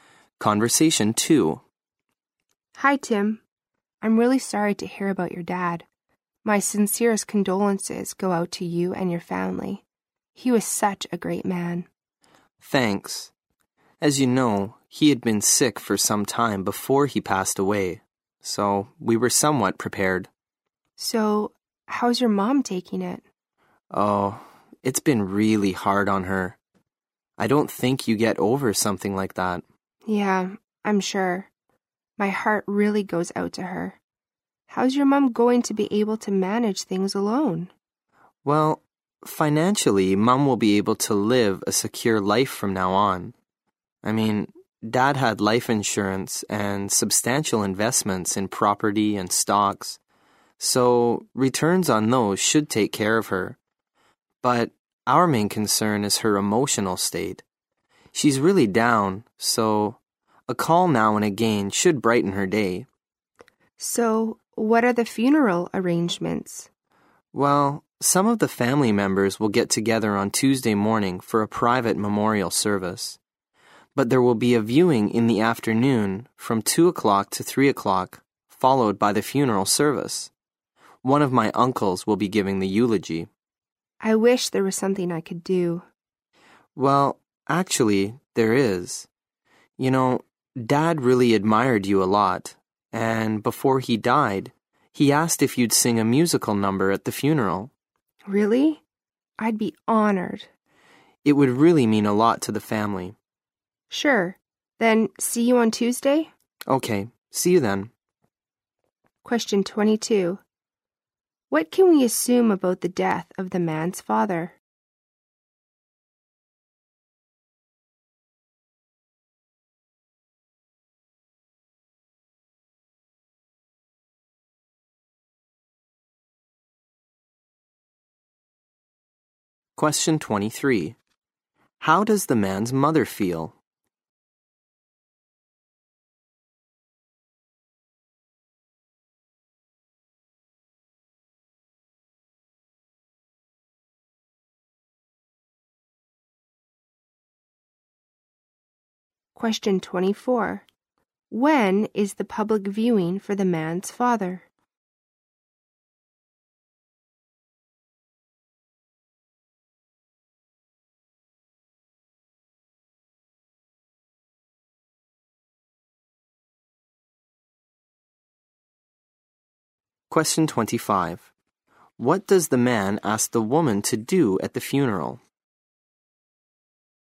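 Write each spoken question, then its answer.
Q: What can we assume about the death of the man's father?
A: He had been sick for some time, so it was expected

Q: How does the man's mother feel?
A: Very sad and down

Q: When is the public viewing for the man's father?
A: Tuesday afternoon from 2 to 3 o'clock

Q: What does the man ask the woman to do at the funeral?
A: Sing a musical number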